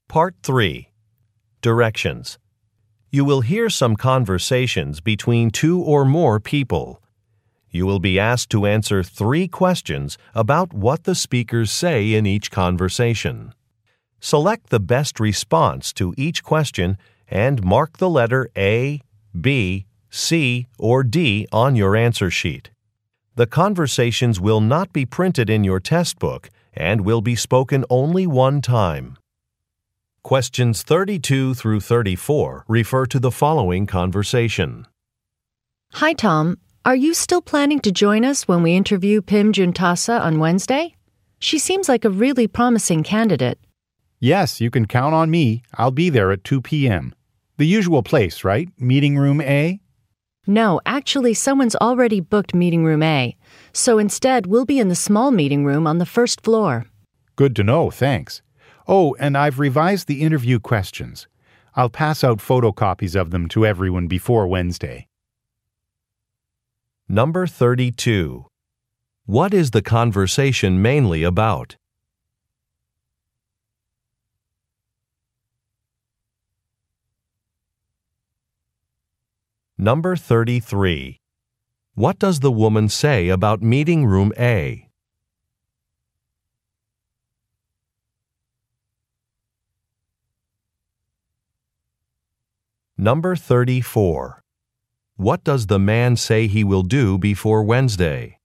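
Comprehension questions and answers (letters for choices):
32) What is the conversation mainly about?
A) Promoting a product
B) Preparing for an interview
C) Resolving a complaint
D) Confirming travel plans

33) What does the woman say about meeting room A?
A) It was renovated.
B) It has no projector.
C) It is not available.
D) It is too small.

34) What does the man say he will do before Wednesday?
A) Present some recent findings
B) Speak with the maintenance crew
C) Assemble a new project team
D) Distribute a handout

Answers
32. B
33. C
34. D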